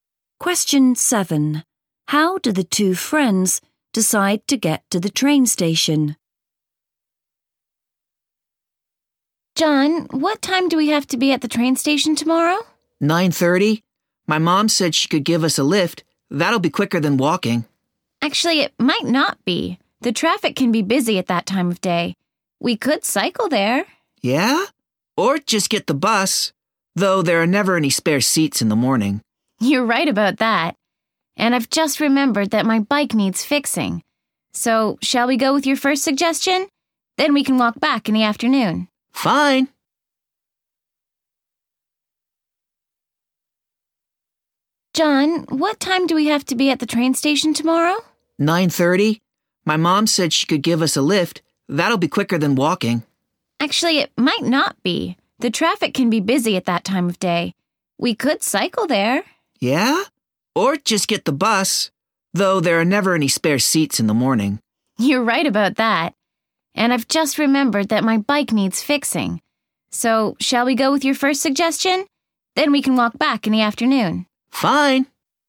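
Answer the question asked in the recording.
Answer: By car (John's mum gives them a lift)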